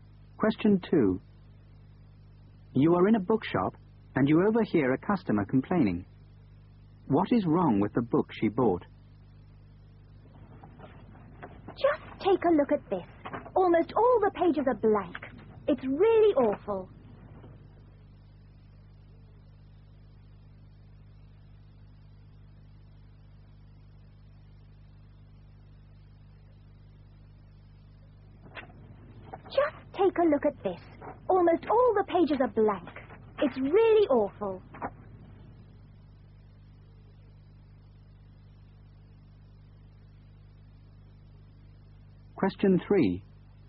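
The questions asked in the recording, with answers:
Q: What is wrong with the book she bought?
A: Almost all the pages are blank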